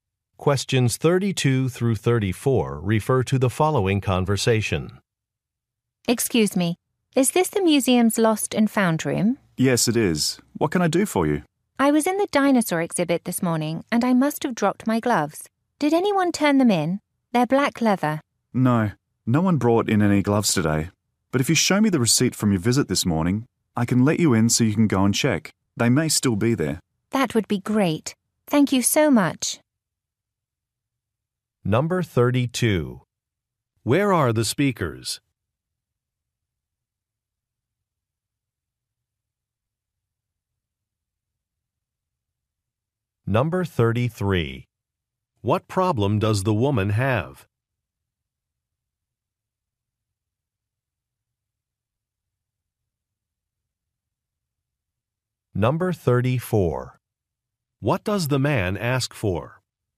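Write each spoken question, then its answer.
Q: Where are the speakers?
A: At a museum's lost and found room

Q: What problem does the woman have?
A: She lost her gloves

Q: What does the man ask for?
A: The receipt from her visit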